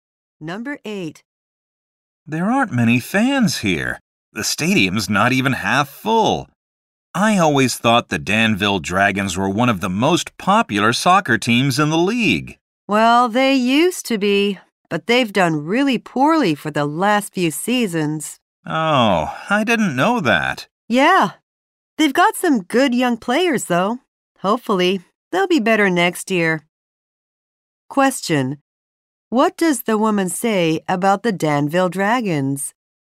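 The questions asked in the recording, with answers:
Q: What does the woman say about the Danville Dragons?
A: They have done poorly for the last few seasons.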